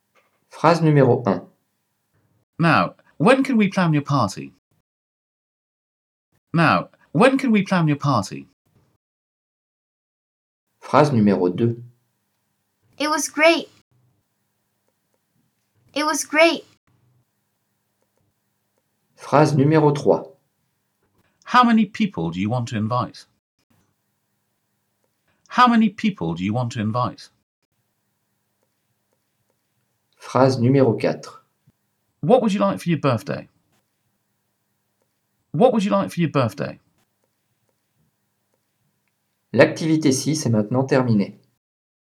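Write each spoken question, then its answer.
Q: Now, when can we plan your party?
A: question

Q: It was great. It was great.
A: exclamation

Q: How many people do you want to invite?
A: question

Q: What would you like for your birthday?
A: question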